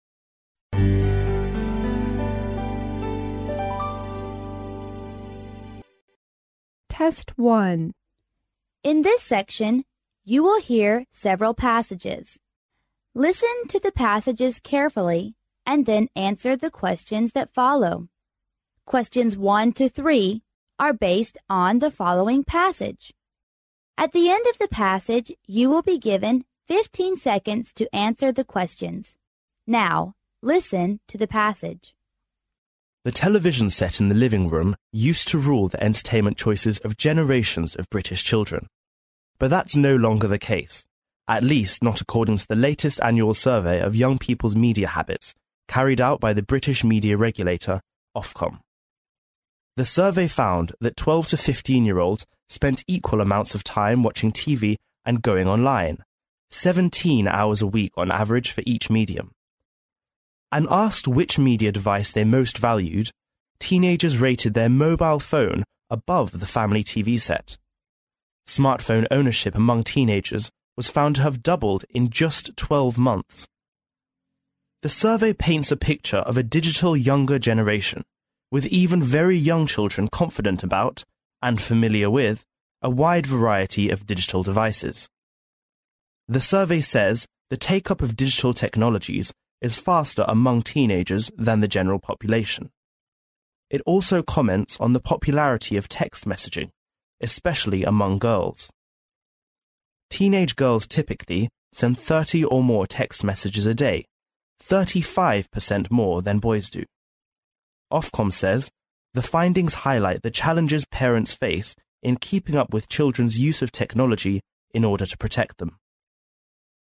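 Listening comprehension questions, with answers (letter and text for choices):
Now,listen to the passage.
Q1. How many hours do teenagers spend both in watching TV and surfing on line in a week?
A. 70 hours.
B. 17 hours.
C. 15 hours.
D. 34 hours.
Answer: D. 34 hours.

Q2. Of all the digital devices,which is most welcomed among teenagers?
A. Computer.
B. TV set.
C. Mobile phone.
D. Laptop.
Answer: C. Mobile phone.

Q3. What can we learn from the passage?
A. TV set should dominate the entertainment time of British children as in the past.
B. The teenagers are forbidden to have access to any digital device.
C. Teenage girls use cell phones more often than boys in sending text messages.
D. It is suggested that parents should use more digital devices in their daily lives.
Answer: C. Teenage girls use cell phones more often than boys in sending text messages.

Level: 英语四级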